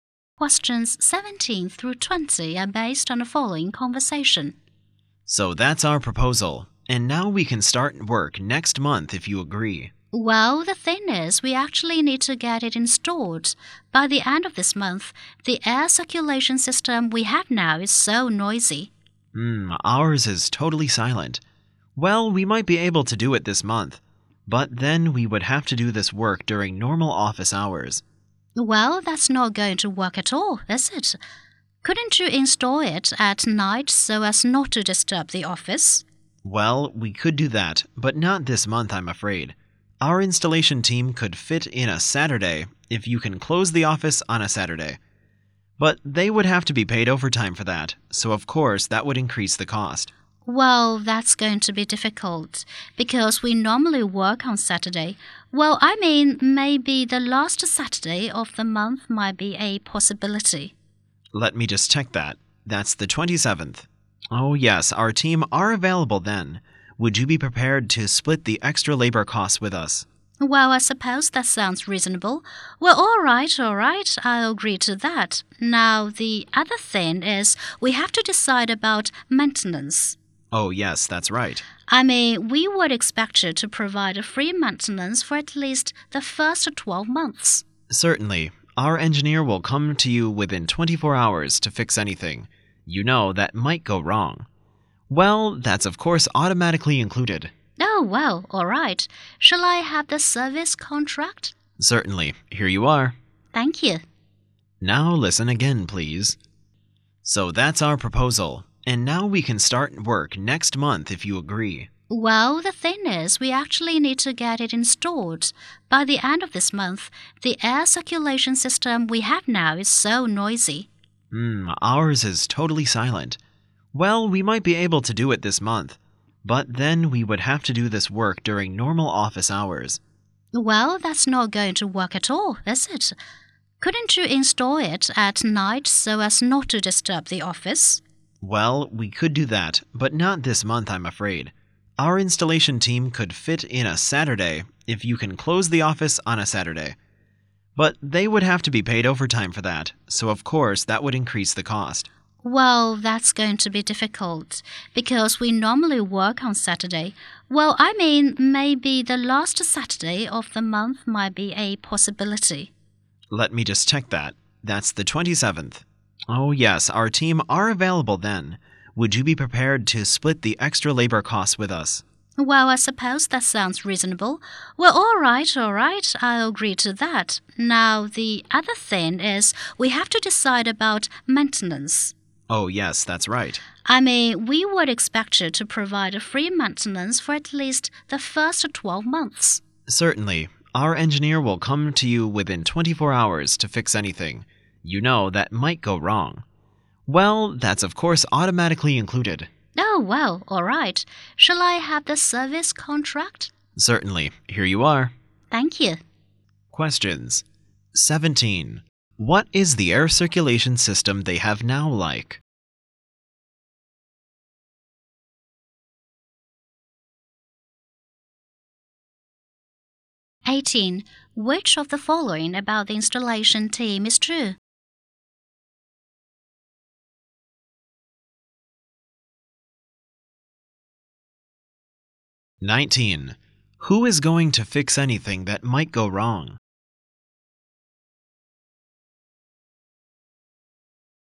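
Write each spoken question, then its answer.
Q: What is the air circulation system they have now like?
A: Very noisy

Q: Who is going to fix anything that might go wrong?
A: Their engineer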